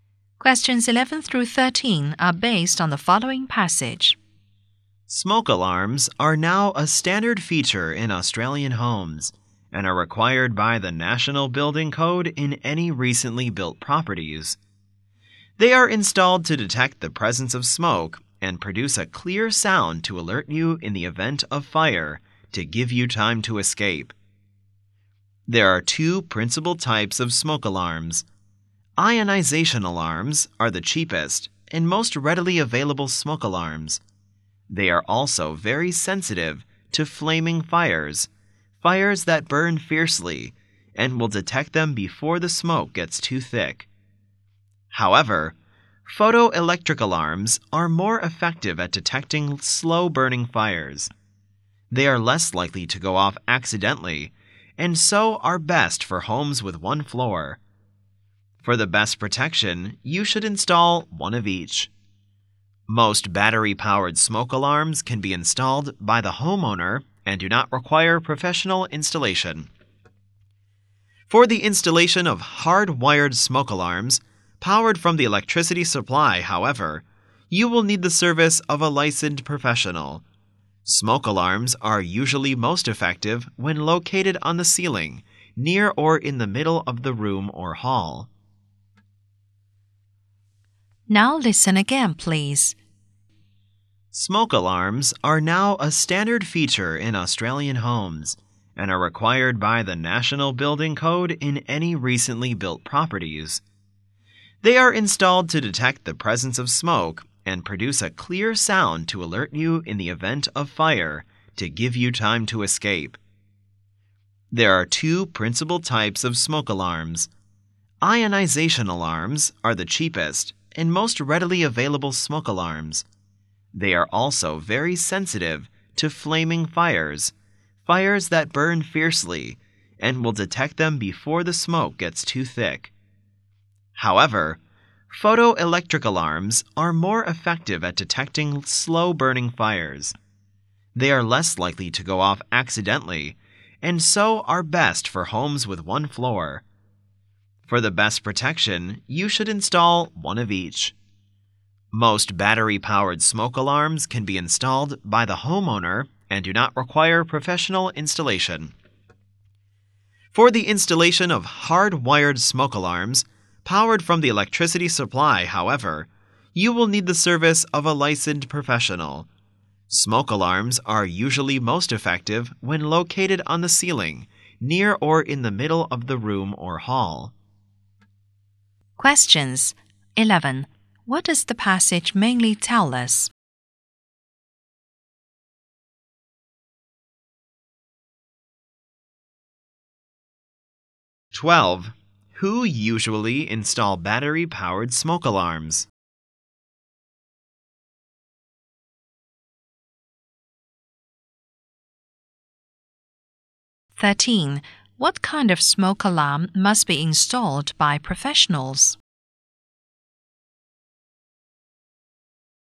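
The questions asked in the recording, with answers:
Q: Who usually install battery-powered smoke alarms?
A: The homeowner

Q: What kind of smoke alarm must be installed by professionals?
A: Hard-wired smoke alarms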